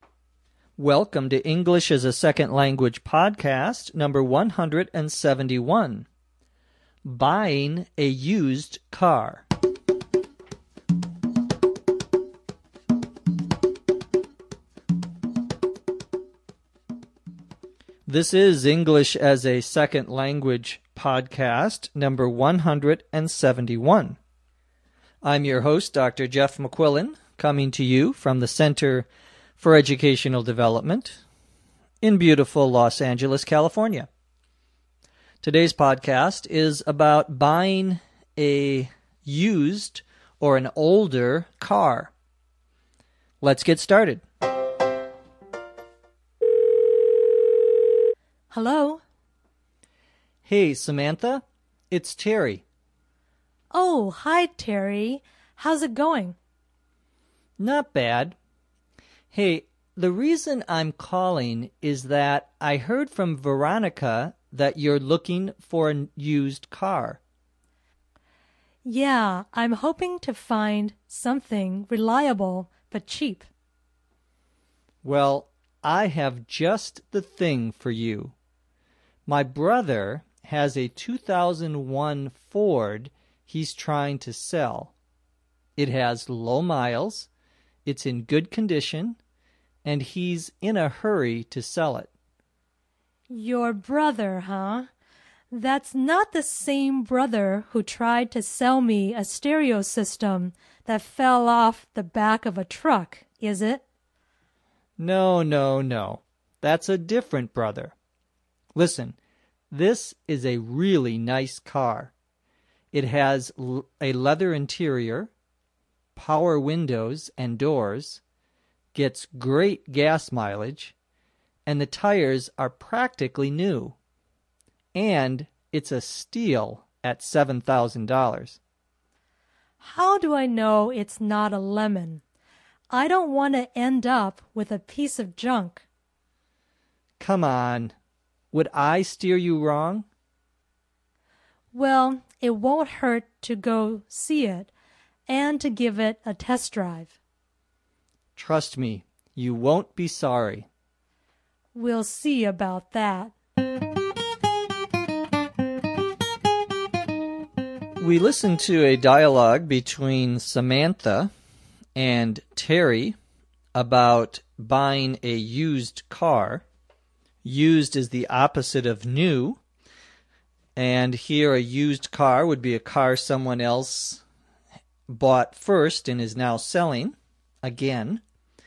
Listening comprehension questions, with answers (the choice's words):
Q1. Why is Samantha not sure about buying a used car from Terry's bother?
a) She and Terry's brother used to be boyfriend and girlfriend.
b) Terry tells her that his brother is not reliable.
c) She thinks that Terry's brother tried to sell her a stolen radio.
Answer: She thinks that Terry's brother tried to sell her a stolen radio.

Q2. Samantha decides to:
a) test drive the used car.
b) buy it from Terry now before someone else buys it.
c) buy a new car instead.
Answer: test drive the used car.

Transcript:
Welcome to Number 171, "Buying a
Used Car."
This is Number 171. I'm your host, Dr.
Jeff McQuillan, coming to you from the Center for Educational Development in
beautiful Los Angeles, California.
Today's podcast is about buying a used or an older car. Let's get started.
Samantha: Hello.
Terry: Hey, Samantha. It's Terry.
Samantha: Oh, hi Terry. How's it going?
Terry: Not bad. Hey, the reason I'm calling is that I heard from Veronica that
you're looking for a used car.
Samantha: Yeah, I'm hoping to find something reliable but cheap.
Terry: Well, I have just the thing for you. My brother has a 2001 Ford he's trying
to sell. It has low miles, it's in good condition, and he's in a hurry to sell it.
Samantha: Your brother, huh? That's not the same brother who tried to sell me a
stereo system that fell off the back of a truck, is it?
Terry: No, no, no. That's a different brother. Listen, this is a really nice car. It has
a leather interior, power windows and doors, gets great gas mileage, and the
tires are practically new. And, it's a steal at $7,000.
Samantha: How do I know it's not a lemon? I don't want to end up with a piece of
junk.
Terry: Come on. Would I steer you wrong?
Samantha: Well, it won't hurt to go see it and to give it a test drive.
Terry: Trust me. You won't be sorry.
Samantha: We'll see about that.
[end of story]
We listened to a dialogue between Samantha and Terry about buying a used car.
*"Used"* is the opposite of new. And here, a used car would be a car someone
else bought first and is now selling again. Samantha says, *"Hello"* and Terry
says, *"Hey Samantha. It's Terry"* - identifies himself. Samantha says, "Oh, hi
Terry. How's it going?" - how are you doing? Terry says, "Not bad. Hey, the